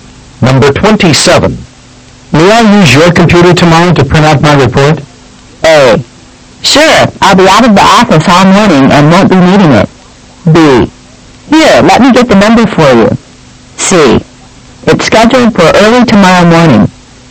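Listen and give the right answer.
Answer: A: Sure, I'll be out of the office all morning and won't be needing it.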